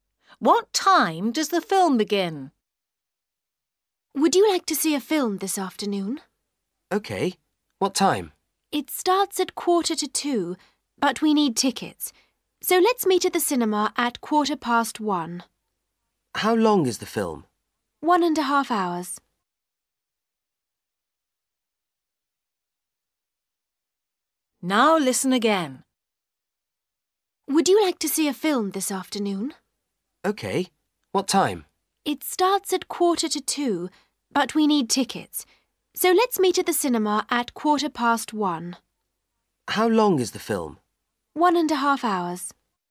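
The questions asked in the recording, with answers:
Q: What time does the film begin?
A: 1:45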